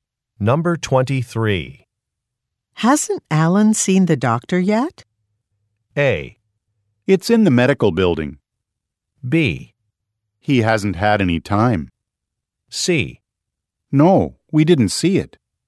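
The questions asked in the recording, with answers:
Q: Hasn't Alan seen the doctor yet?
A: B: He hasn't had any time.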